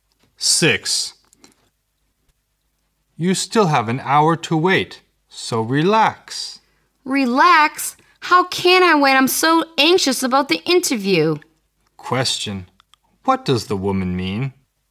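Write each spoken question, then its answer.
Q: What does the woman mean?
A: She can't relax because she's anxious about the interview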